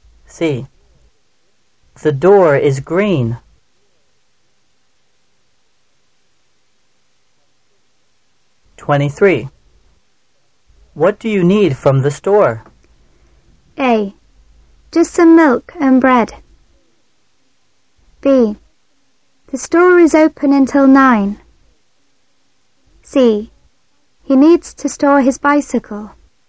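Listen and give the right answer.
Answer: A: Just some milk and bread.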